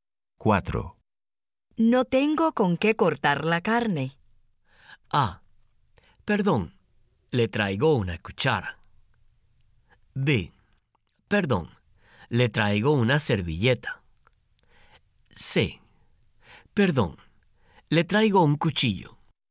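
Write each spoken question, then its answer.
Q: No tengo con qué cortar la carne.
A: C: Perdón, le traigo un cuchillo.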